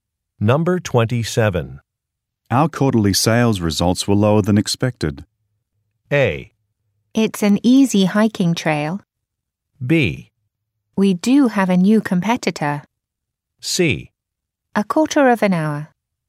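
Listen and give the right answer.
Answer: B: We do have a new competitor.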